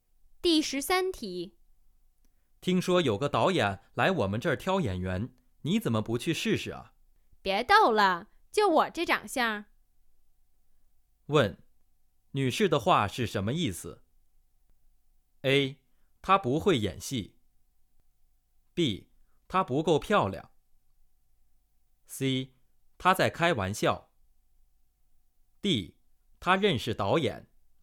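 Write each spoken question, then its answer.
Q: 问,女士的话是什么意思?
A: B: 她不够漂亮。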